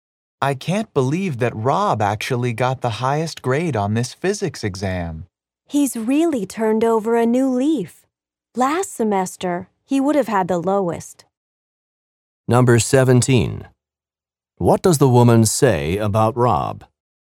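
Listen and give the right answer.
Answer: He has improved a lot; last semester he would have had the lowest grade.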